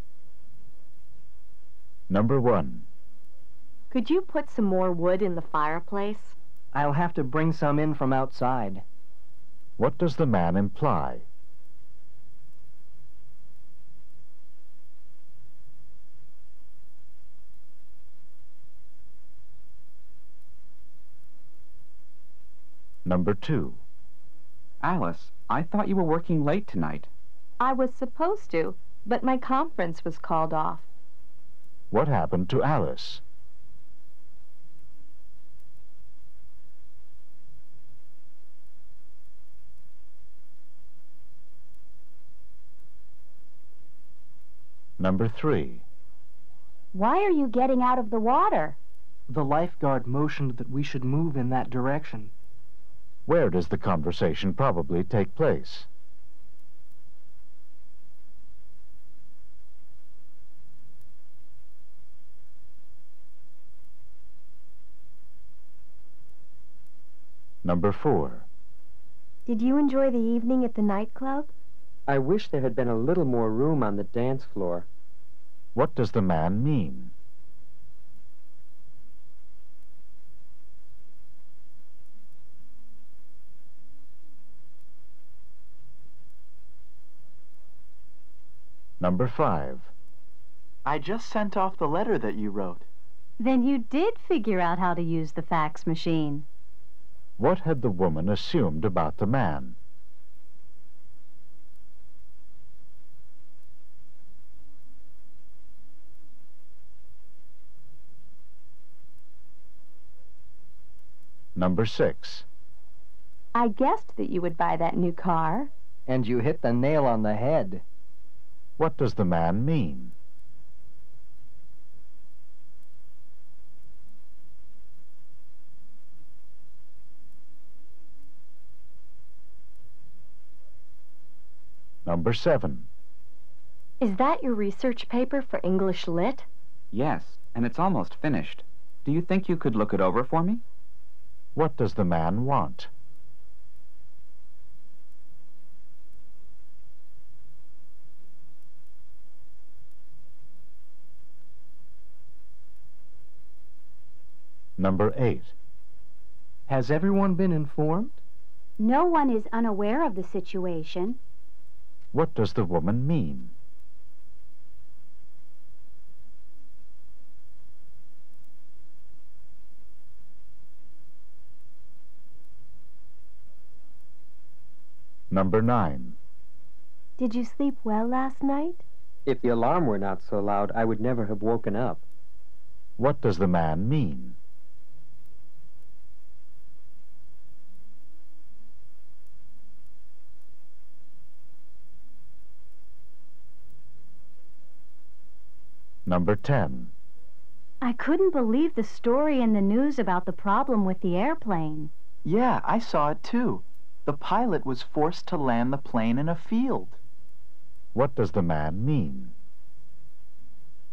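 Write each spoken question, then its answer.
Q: What does the man imply?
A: There is no more wood inside.

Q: What happened to Alice?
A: Her conference was canceled.

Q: Where does the conversation probably take place?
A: At a beach or swimming area.

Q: What does the man mean?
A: The dance floor was too crowded.

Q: What had the woman assumed about the man?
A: That he didn't know how to use the fax machine.

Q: What does the man mean?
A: The woman guessed correctly.

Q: What does the man want?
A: For the woman to review his research paper.

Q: What does the woman mean?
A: Everyone has been informed.

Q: What does the man mean?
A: He slept deeply; only the loud alarm woke him.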